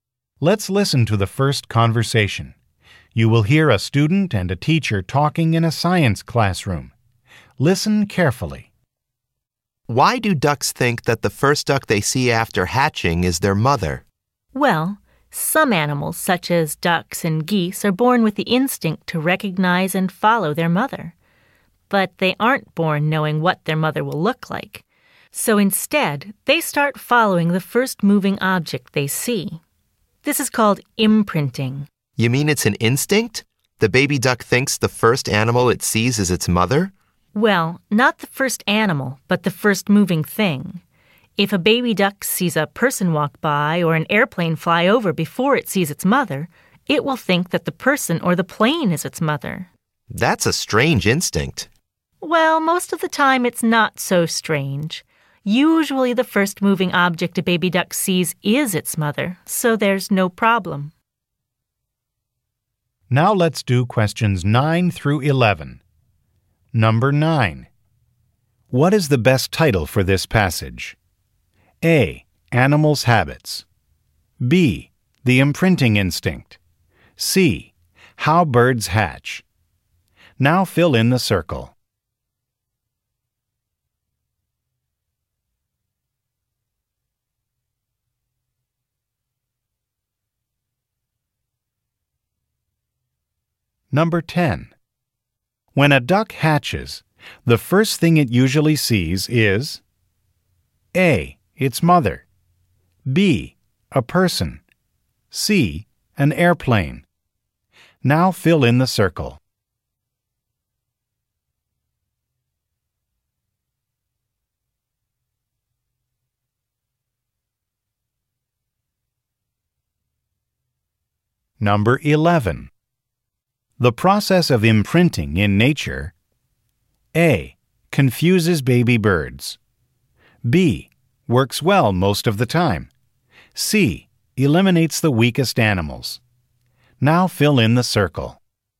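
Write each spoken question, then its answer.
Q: What is the best title for this passage?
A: B: The imprinting instinct.

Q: When a duck hatches, the first thing it usually sees is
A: A: Its mother.

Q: The process of imprinting in nature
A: B: Works well most of the time.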